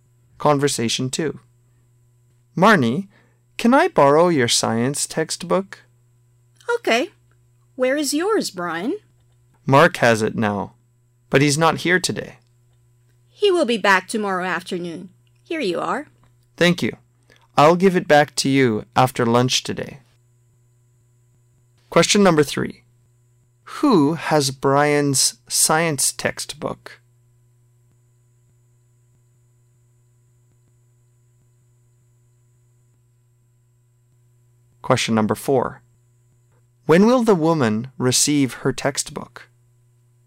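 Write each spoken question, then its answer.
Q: Who has Brian's science textbook?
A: Mark

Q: When will the woman receive her textbook?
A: After lunch today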